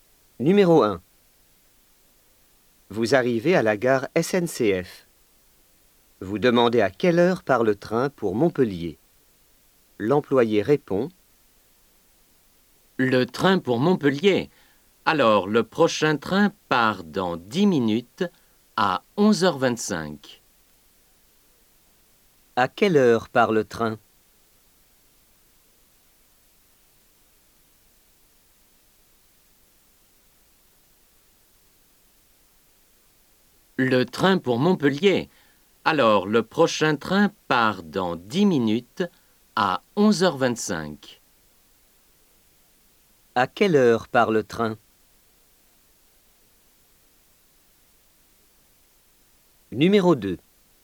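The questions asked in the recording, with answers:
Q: À quelle heure part le train?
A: À 11h25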